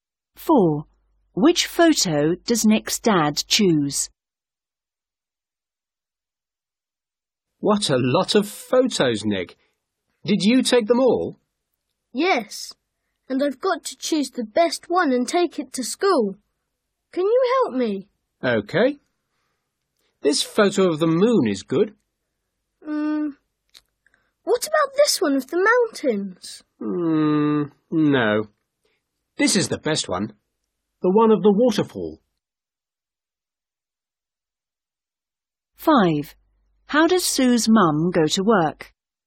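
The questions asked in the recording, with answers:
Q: Which photo does Nick's dad choose?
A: The one of the waterfall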